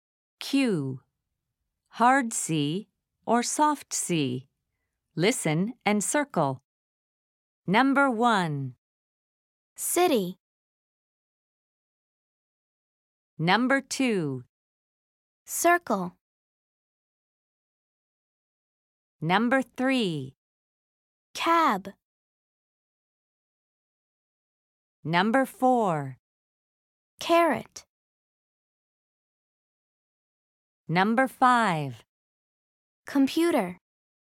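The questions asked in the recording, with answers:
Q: City.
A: soft C

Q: Carrot.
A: hard C

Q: Computer.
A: hard C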